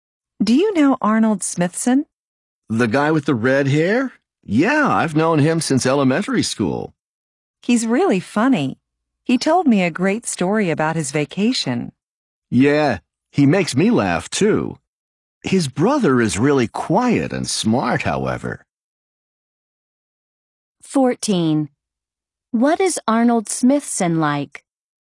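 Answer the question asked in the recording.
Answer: He is funny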